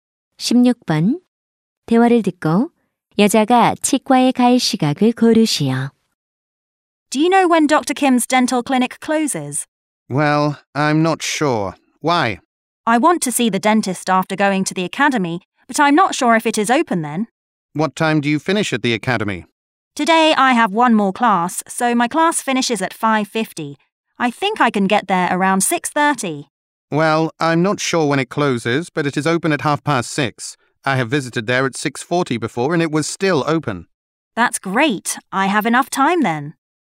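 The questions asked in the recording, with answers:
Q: 대화를 듣고 여자가 치과에 갈 시각을 고르시오.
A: 6시 30분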